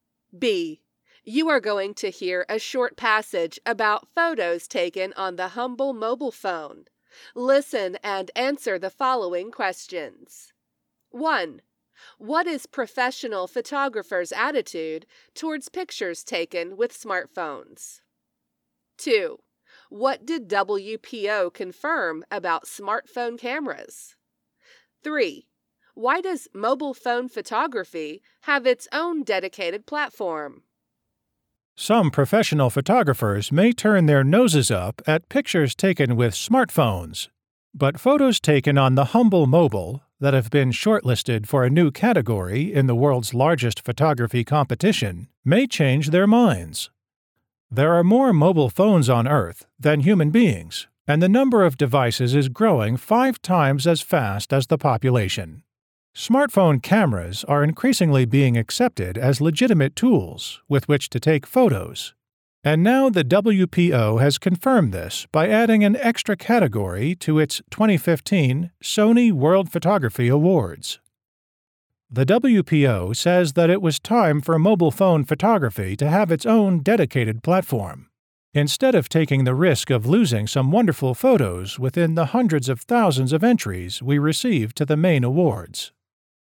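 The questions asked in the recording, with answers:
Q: What is professional photographers' attitude towards pictures taken with smartphones?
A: Some may turn their noses up at them (look down on them).

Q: What did WPO confirm about smartphone cameras?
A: That they are increasingly accepted as legitimate tools for taking photos.

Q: Why does mobile phone photography have its own dedicated platform?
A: To avoid losing wonderful photos among the hundreds of thousands of entries to the main awards.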